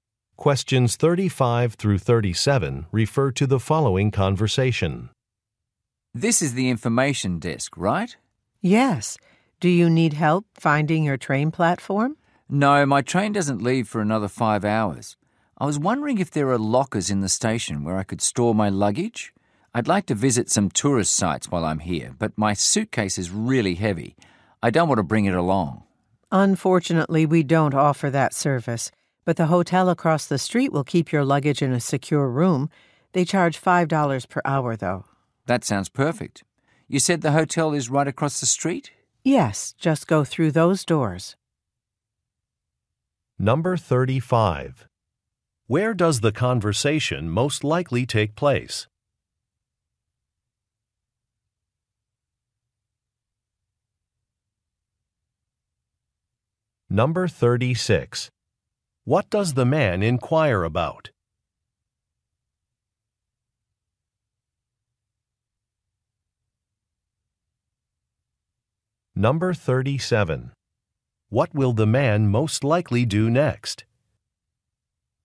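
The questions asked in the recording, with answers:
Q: Where does the conversation most likely take place?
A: At a train station.

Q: What does the man inquire about?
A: Luggage storage lockers.

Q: What will the man most likely do next?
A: Go to the hotel across the street.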